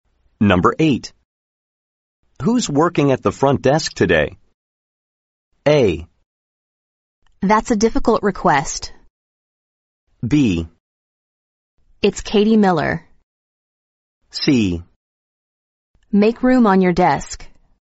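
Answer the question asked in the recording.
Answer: B: It's Katie Miller.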